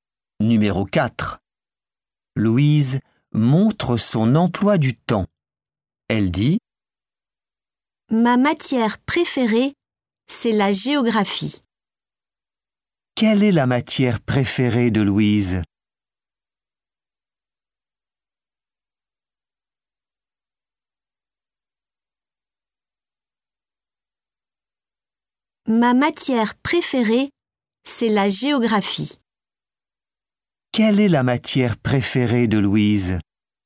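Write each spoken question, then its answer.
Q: Quelle est la matière préférée de Louise?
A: la géographie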